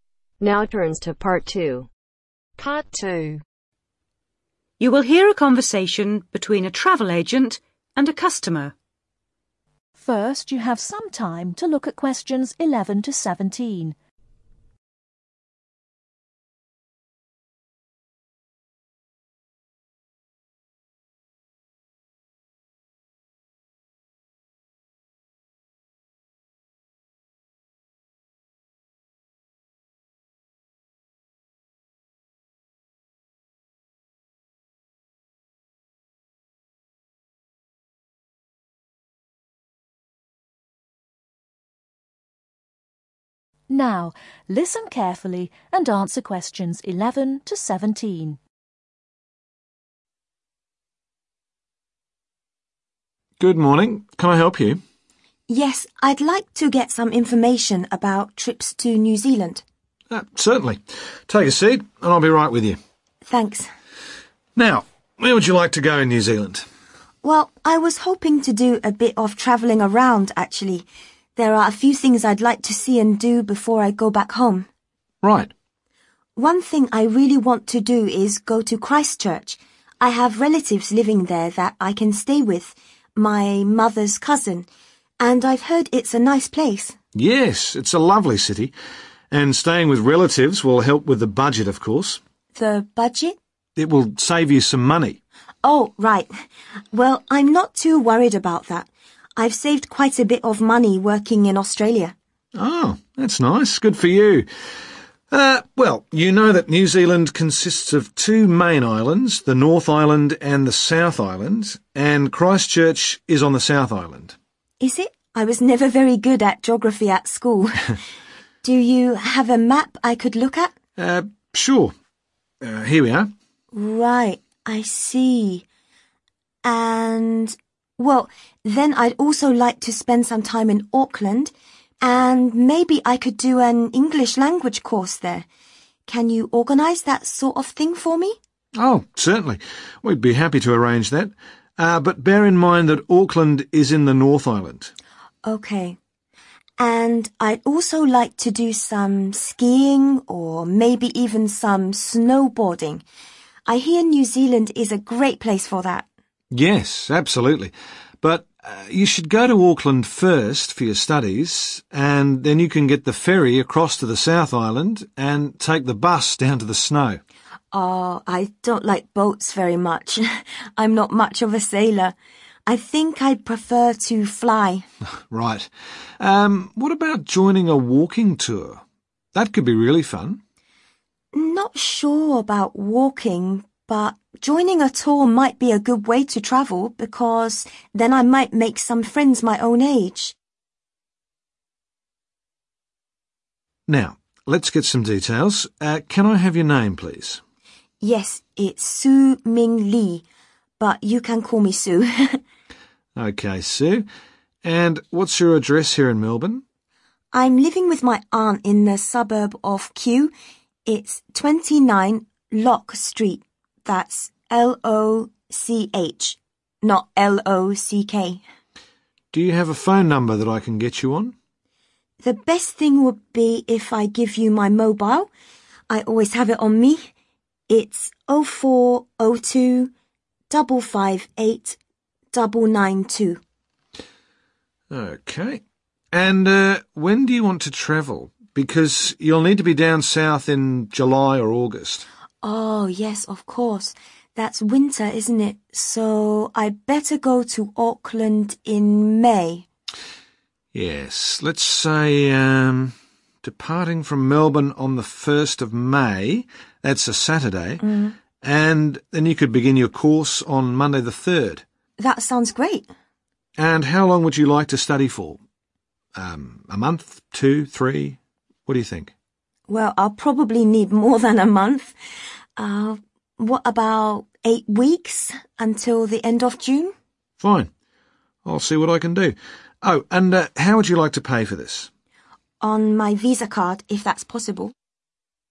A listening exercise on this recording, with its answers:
Choose THREE letters A-H.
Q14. Address (14) ................ St Kew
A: (29 LOCH)

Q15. Mobile (15) 0402 .................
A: (558992)

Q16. Day and date of departure (16) ................ 1st May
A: Saturday

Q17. Length of course (17) ..................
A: (8 week/2 months)